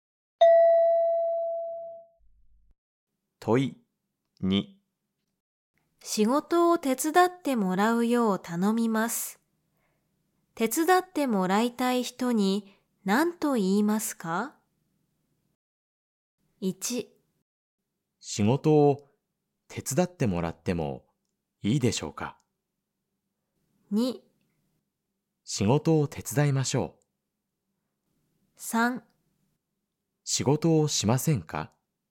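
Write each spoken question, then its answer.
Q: 仕事を手伝ってもらうよう頼みます。手伝ってもらいたい人に何と言いますか?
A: 1: 仕事を手伝ってもらってもいいでしょうか?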